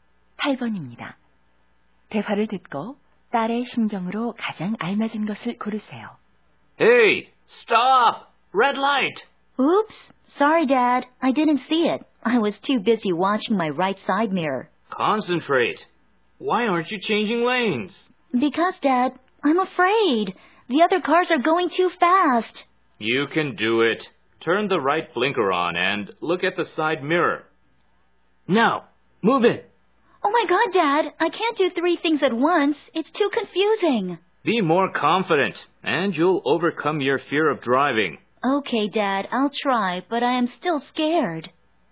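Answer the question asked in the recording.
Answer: 두려움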